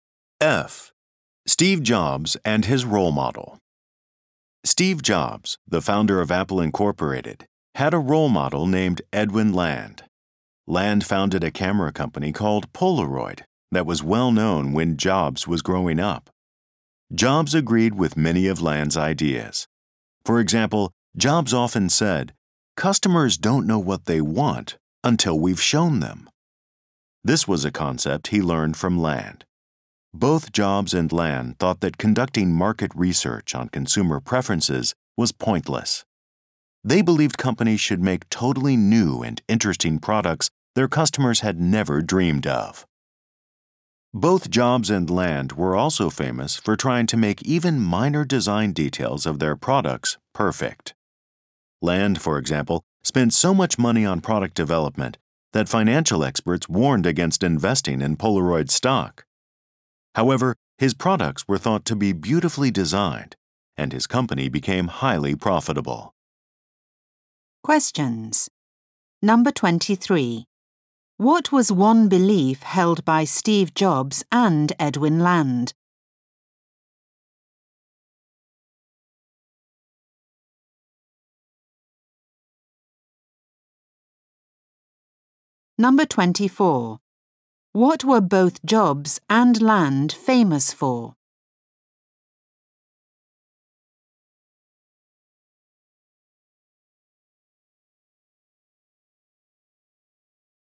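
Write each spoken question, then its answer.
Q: What was one belief held by Steve Jobs and Edwin Land?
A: Market research on consumer preferences was pointless

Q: What were both Jobs and Land famous for?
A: Trying to make even minor design details perfect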